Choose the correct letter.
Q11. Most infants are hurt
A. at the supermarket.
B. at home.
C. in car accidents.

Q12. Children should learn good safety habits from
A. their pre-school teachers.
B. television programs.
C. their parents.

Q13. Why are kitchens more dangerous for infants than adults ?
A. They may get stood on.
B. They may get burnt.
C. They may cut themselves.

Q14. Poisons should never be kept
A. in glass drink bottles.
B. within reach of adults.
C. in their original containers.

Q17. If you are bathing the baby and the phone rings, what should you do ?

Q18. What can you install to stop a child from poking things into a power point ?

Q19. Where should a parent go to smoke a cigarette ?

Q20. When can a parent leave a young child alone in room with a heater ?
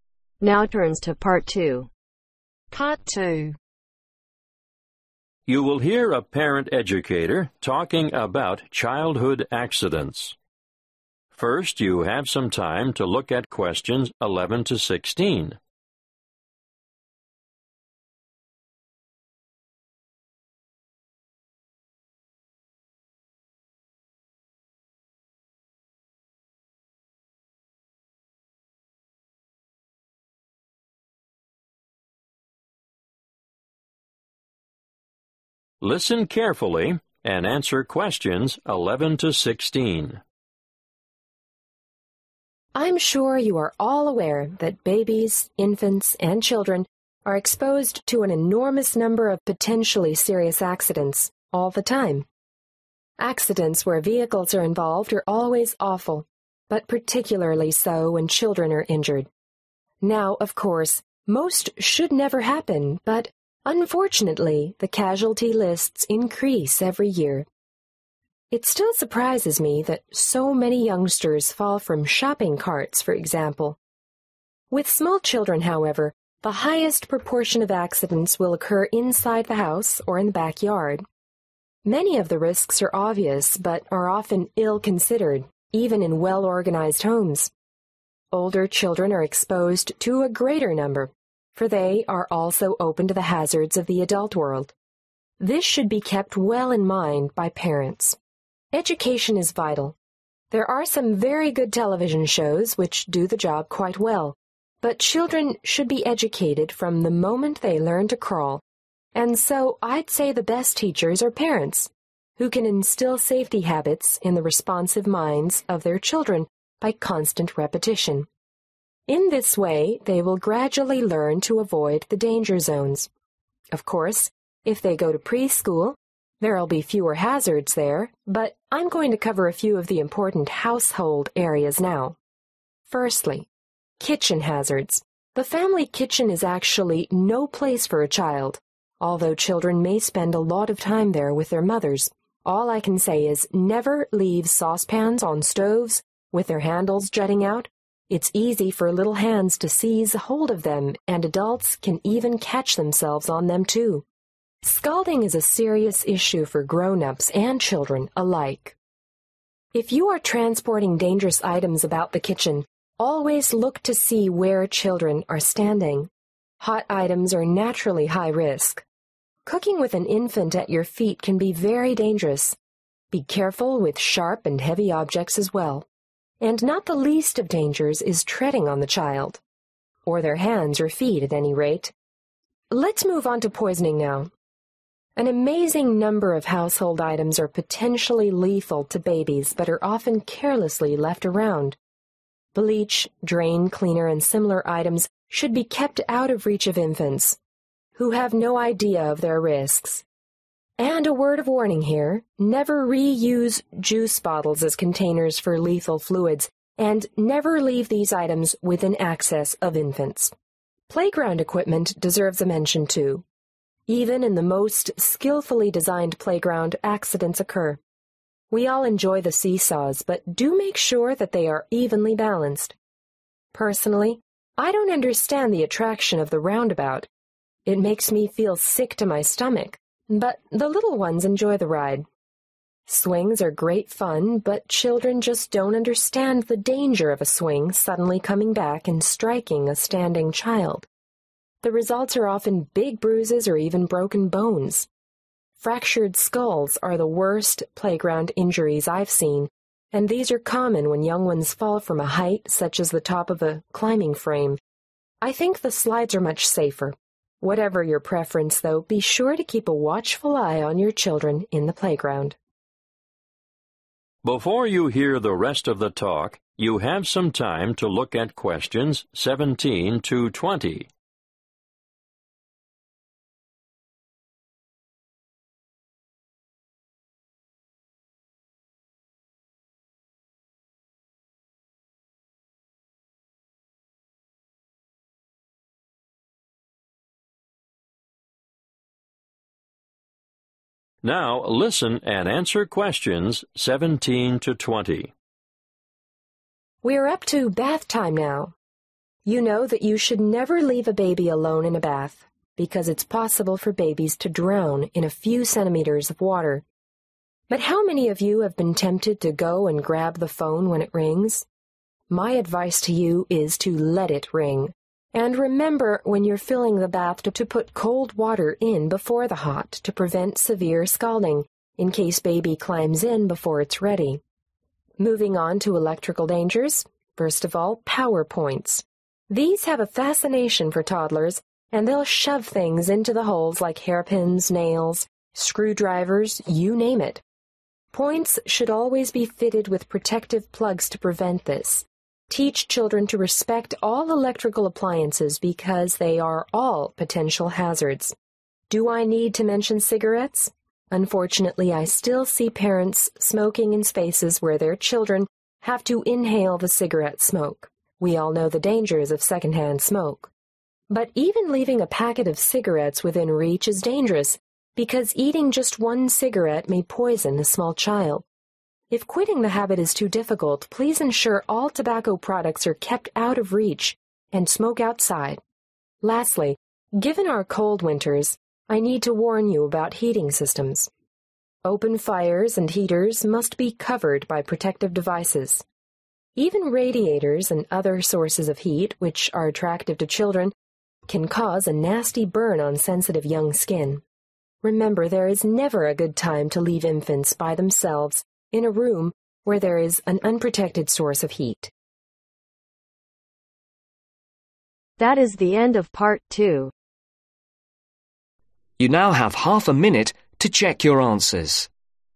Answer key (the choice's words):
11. at home.
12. their parents.
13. They may get stood on.
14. in glass drink bottles.
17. Let it ring
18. Protective plugs
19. Outside
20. Never